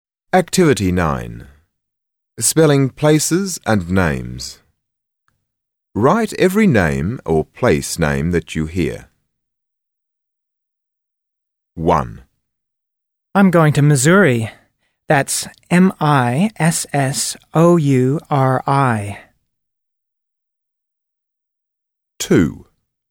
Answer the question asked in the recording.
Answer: Missouri